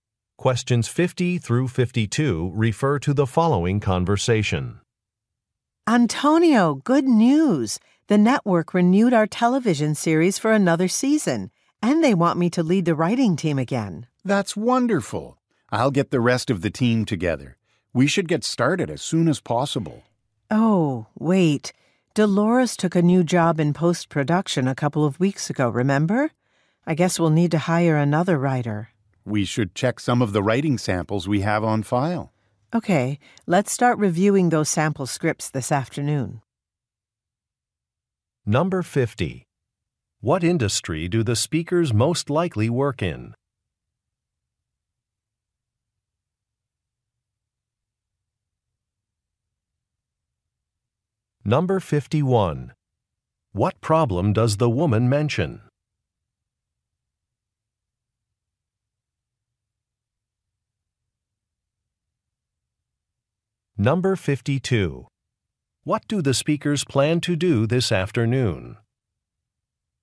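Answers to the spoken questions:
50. Television.
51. A writer left, so they need to hire another.
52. Review sample scripts.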